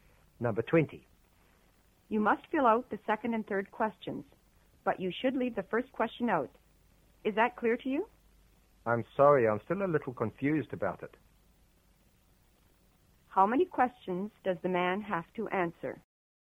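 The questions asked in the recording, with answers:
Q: How many questions does the man have to answer?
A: Two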